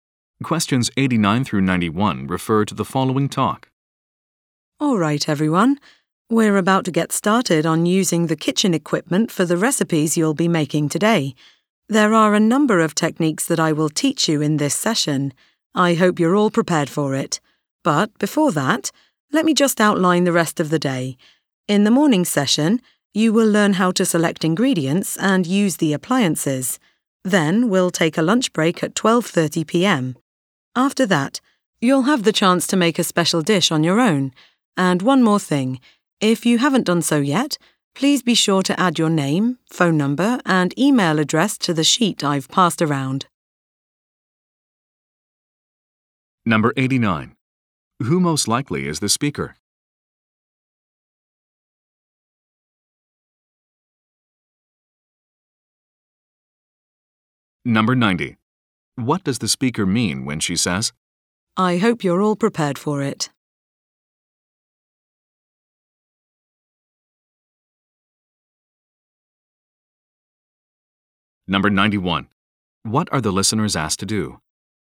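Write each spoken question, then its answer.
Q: Who most likely is the speaker?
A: A cooking instructor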